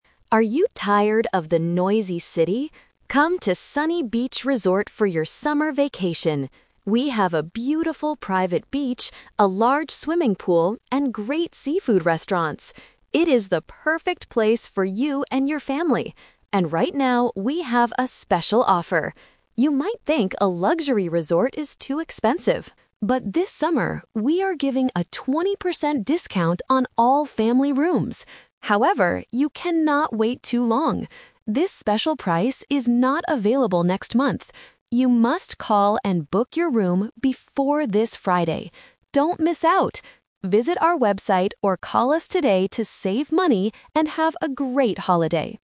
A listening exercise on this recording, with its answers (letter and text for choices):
Listen to a radio advertisement for a resort. Choose the correct answer (A, B, or C) for each question.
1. What is the advertisement mainly about?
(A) A seafood restaurant.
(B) A beach resort.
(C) A city tour.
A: (B) A beach resort.

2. What is the special summer offer?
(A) Free meals for children.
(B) A 20% discount for couples.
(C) A 20% discount for family rooms.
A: (C) A 20% discount for family rooms.

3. What must customers do to get the discount? (The Twist)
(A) Book their room next month.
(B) Call and book before Friday.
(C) Pay for the room on the website.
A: (B) Call and book before Friday.

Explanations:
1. The speaker clearly invites listeners at the beginning: "Come to Sunny Beach Resort for your summer vacation!" Trap: Option A is a trap because the ad mentions "seafood restaurants," but that is just one part of the resort, not the main topic. Option C is a trap using the word "city" (the ad asks if you are tired of the noisy city).
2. The advertisement says, "...we are giving a 20% discount on all family rooms!" Trap: Option A is a plausible resort offer but is never mentioned. Option B is a trap because the discount is specifically for "family rooms," not just couples.
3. This is the Twist (the condition). Listeners might think the offer lasts all summer, but the speaker warns: "You must call and book your room before this Friday." Trap: Option A is exactly what they cannot do ("This special price is not available next month"). Option C is incorrect; the ad says "Visit our website or call us," but doesn't say you must pay online to get the discount.

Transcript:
Voiceover: Are you tired of the noisy city? Come to Sunny Beach Resort for your summer vacation! We have a beautiful private beach, a large swimming pool, and great seafood restaurants. It is the perfect place for you and your family. And right now, we have a special offer. You might think a luxury resort is too expensive. But this summer, we are giving a 20% discount on all family rooms! However, you cannot wait too long. This special price is not available next month. You must call and book your room before this Friday. Don't miss out! Visit our website or call us today to save money and have a great holiday.